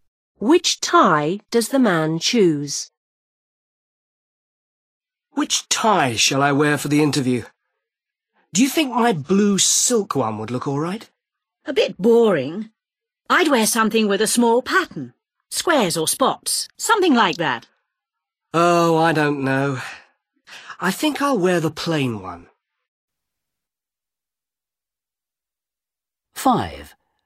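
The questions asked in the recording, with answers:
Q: Which tie does the man choose?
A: The plain one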